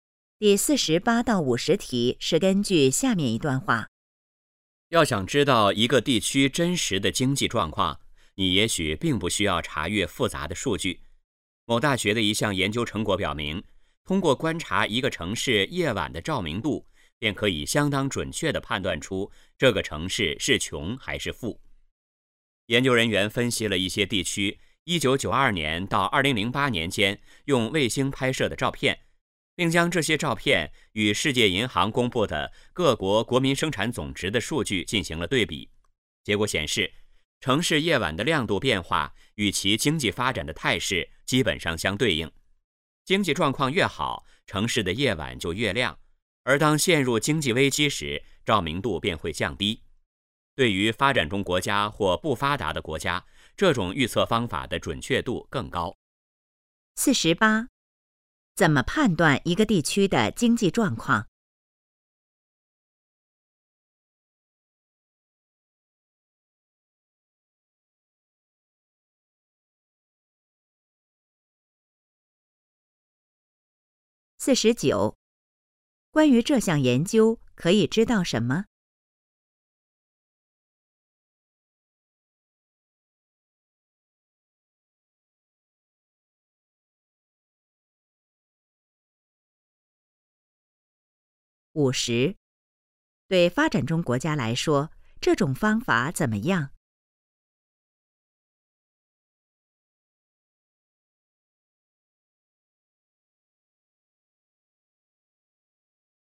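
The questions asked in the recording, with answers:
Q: 怎么判断一个地区的经济状况?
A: 观察城市夜晚的照明度

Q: 对发展中国家来说,这种方法怎么样?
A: 准确度更高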